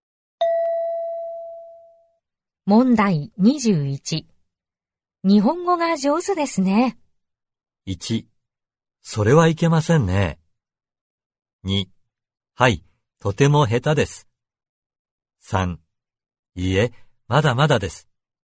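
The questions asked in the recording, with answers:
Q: 日本語が上手ですね。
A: 3: いえ、まだまだです。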